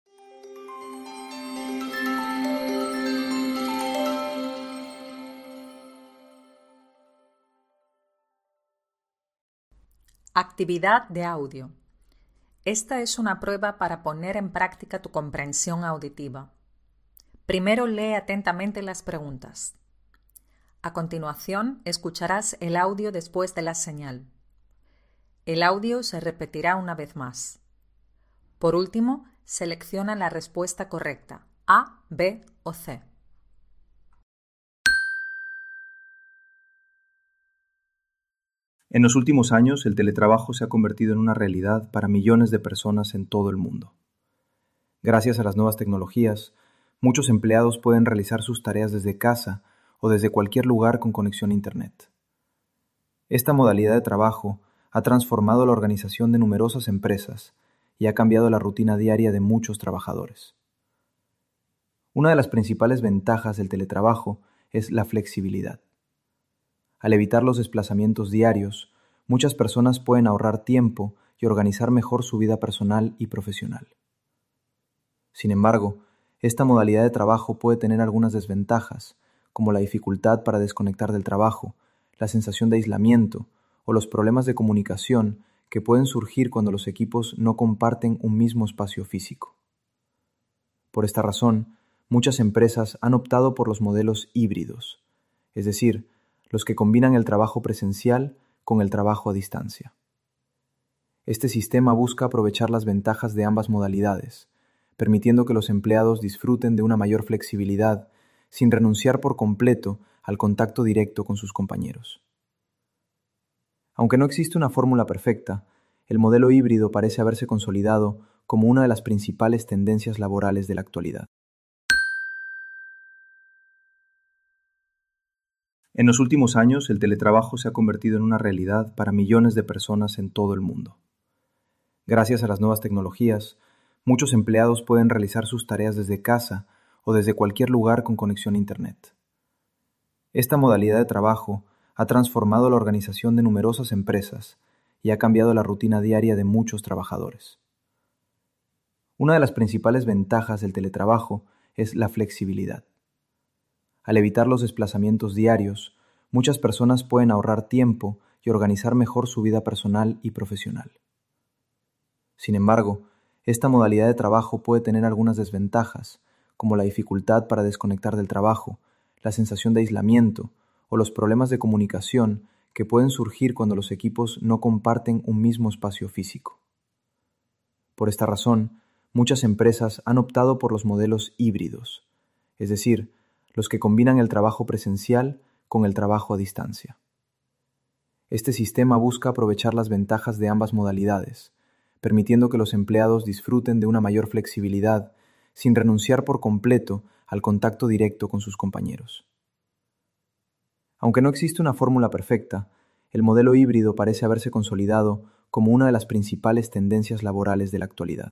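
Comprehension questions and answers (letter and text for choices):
[ES] Parte 3: Comprensión Auditiva. Escucha el siguiente audio y responde a las preguntas (puedes escucharlo tantas veces como necesites).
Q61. Según la audición, el teletrabajo...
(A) es exigido como única modalidad de trabajo por parte de ciertas empresas.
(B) no es factible para muchos trabajadores.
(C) ha cambiado el día a día de numerosos empleados.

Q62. En la audición se dice que el trabajo a distancia...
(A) hace que los empleados ahorren tiempo al no tener que desplazarse.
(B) disminuye el número de accidentes laborales.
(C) hace que un buen número de trabajadores tenga una vida más sedentaria.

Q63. Según el audio, uno de los aspectos negativos del teletrabajo es...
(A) la sensación de muchos trabajadores de estar desconectados de su entorno.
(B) los fallos en la conexión a internet en ciertas regiones.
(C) la falta de control de los superiores sobre sus empleados.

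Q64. Según la audición, la combinación de trabajo presencial y teletrabajo...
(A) está todavía enfase de experimentación.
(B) es la opción elegida por muchas empresas.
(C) es inviable en ciertas profesiones.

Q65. En el audio se da a entender que las modalidades híbridas...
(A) permiten que los empleados gocen de los beneficios de combinar teletrabajo y trabajo presencial.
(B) requieren una mayor planificación de las tareas que se deben llevar a cabo en el trabajo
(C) no satisfacen a todos los trabajadores.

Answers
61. (C) ha cambiado el día a día de numerosos empleados.
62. (A) hace que los empleados ahorren tiempo al no tener que desplazarse.
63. (A) la sensación de muchos trabajadores de estar desconectados de su entorno.
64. (B) es la opción elegida por muchas empresas.
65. (A) permiten que los empleados gocen de los beneficios de combinar teletrabajo y trabajo presencial.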